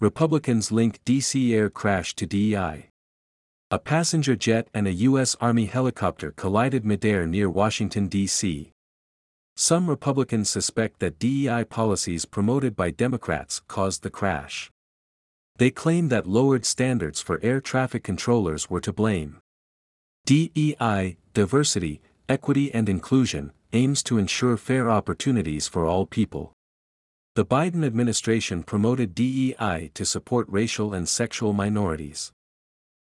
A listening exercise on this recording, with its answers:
次の各質問の答えを探しながら聞きましょう。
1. What collided midair near Washington, D.C.?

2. What do some Republicans suspect?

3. Why did the Biden administration promote DEI?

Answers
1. A passenger jet and a U.S. Army helicopter did.
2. They suspect that DEI policies promoted by Democrats caused the crash.
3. To support racial and sexual minorities.

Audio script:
A passenger jet and a U.S. Army helicopter collided midair near Washington, D.C.
Some Republicans suspect that DEI policies promoted by Democrats caused the crash.
They claim that lowered standards for air traffic controllers were to blame.
DEI (Diversity, Equity & Inclusion) aims to ensure fair opportunities for all people.
The Biden administration promoted DEI to support racial and sexual minorities.